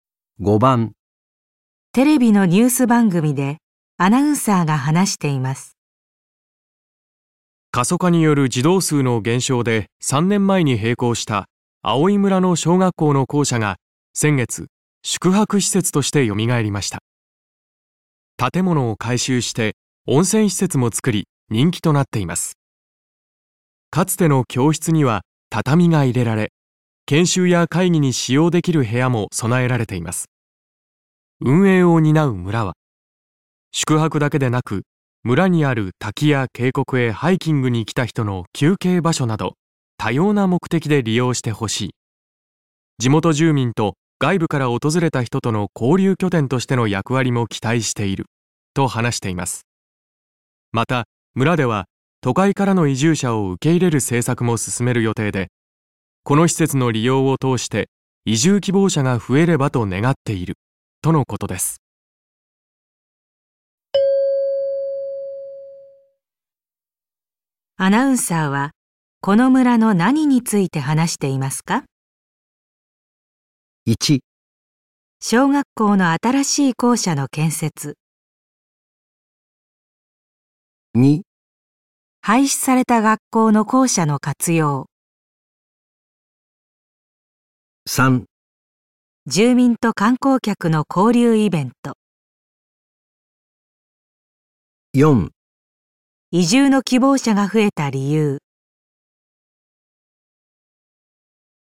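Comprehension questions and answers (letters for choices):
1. アナウンサーはこの村の何について話していますか。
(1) 小学校の新しい校舎の建設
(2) 廃止された学校の校舎の活用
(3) 住民と観光客の交流イベント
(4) 移住の希望者が増えた理由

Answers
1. 2

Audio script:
かつての教室には畳が入れられ、研修や 会議に使用できる部屋も備えられています。 運営を担う村は、「宿泊だけでなく村にある滝や渓谷へハイキン グに来た人の休憩場所など、多様な目的で利用してほしい、地元住民と外部から訪れた人との交流拠点とし ての役割も期待している」と話しています。 また、村では都会からの移住者を受け入れる政策も進める予定 で、この施設の利用を通して移住希望者が増えればと願っているとのことです。

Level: N1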